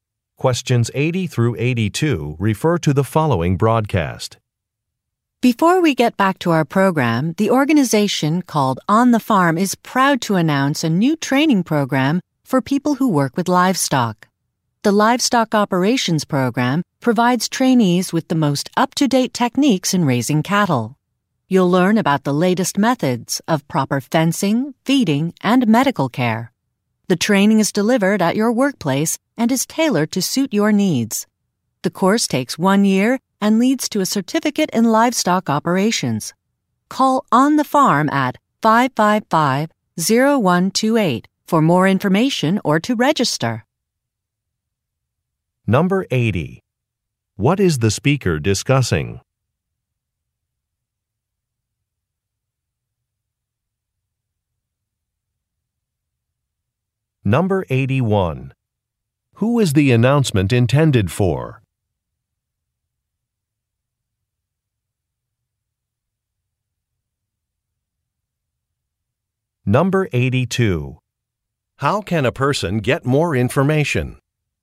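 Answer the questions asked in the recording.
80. A livestock training program
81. People who work with livestock
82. By calling On the Farm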